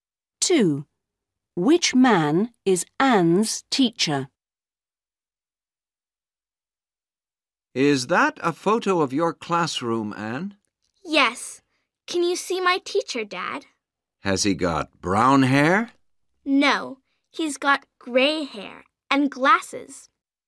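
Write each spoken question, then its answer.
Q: Which man is Anne's teacher?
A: the man with gray hair and glasses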